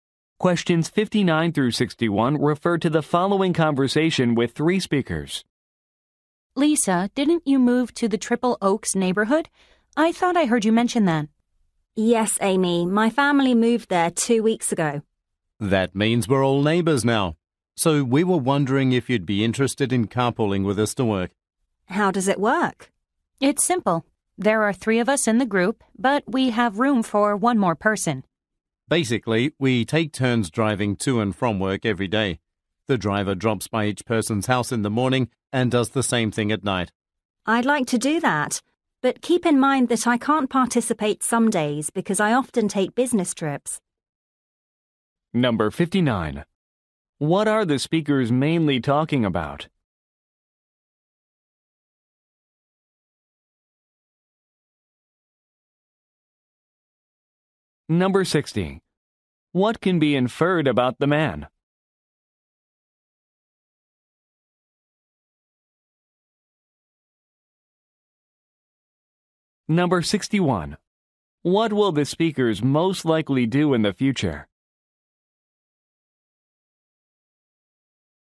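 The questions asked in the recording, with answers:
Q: What are the speakers mainly talking about?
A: Carpooling to work

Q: What will the speakers most likely do in the future?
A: Take turns driving to work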